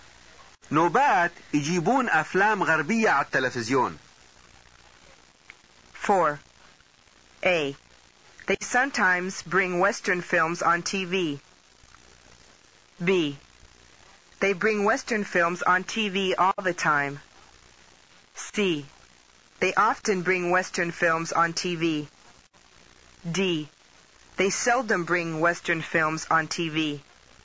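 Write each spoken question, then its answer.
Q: أربعة. نوبات يجيبون أفلام غربية على التلفزيون.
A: A: They sometimes bring Western films on TV.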